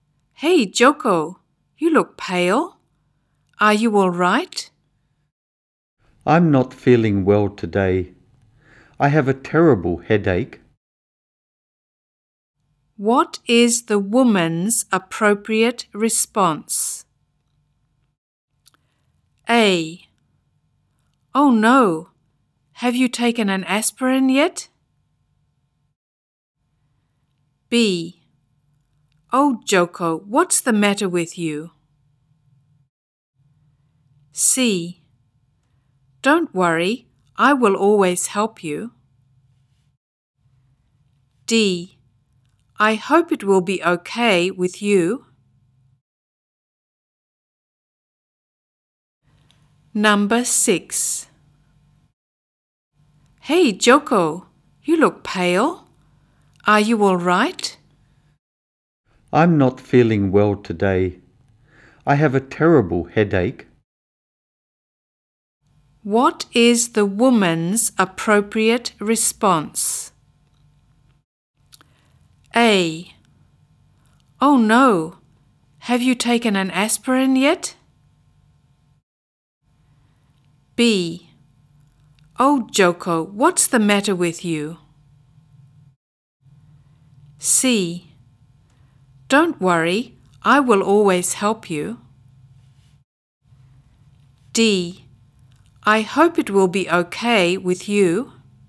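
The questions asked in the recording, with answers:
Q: What is the woman's appropriate response?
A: A: Oh no, have you taken an aspirin yet?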